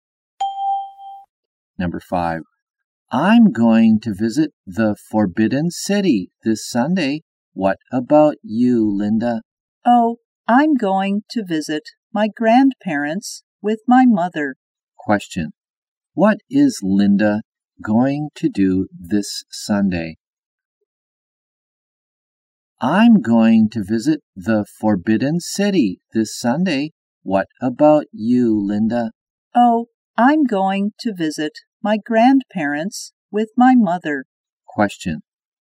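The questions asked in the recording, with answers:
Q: What is Linda going to do this Sunday?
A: Visit her grandparents with her mother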